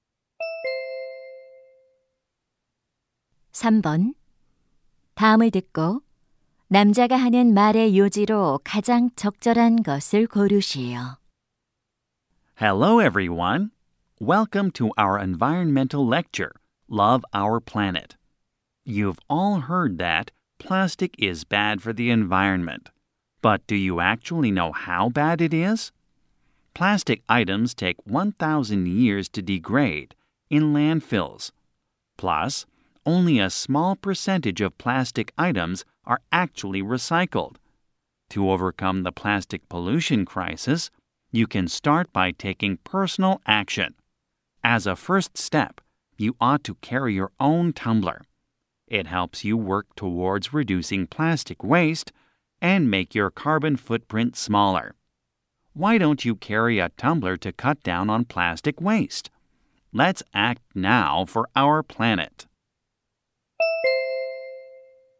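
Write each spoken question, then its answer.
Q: 다음을 듣고 남자가 하는 말의 요지로 가장 적절한 것을 고르시오.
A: 플라스틱 쓰레기를 줄이기 위해 개인 텀블러를 가지고 다녀야 한다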